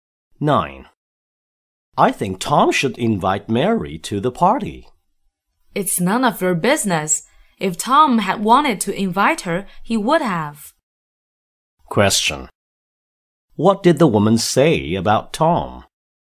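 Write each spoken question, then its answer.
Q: What did the woman say about Tom?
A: Tom doesn't want to invite Mary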